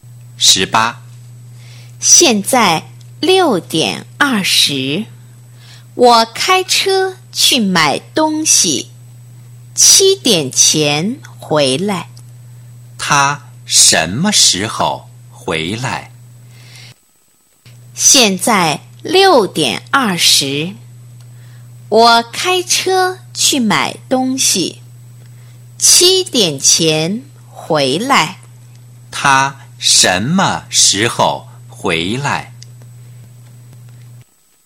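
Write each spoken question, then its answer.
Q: 他什么时候回来?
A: 7:00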